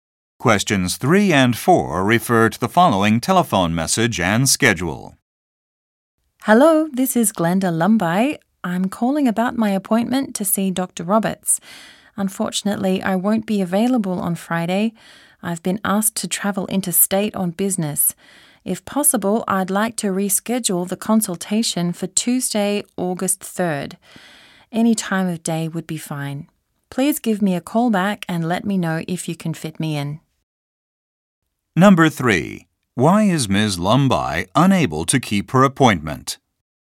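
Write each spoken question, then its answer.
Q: Why is Ms. Lumbye unable to keep her appointment?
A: She has to travel interstate on business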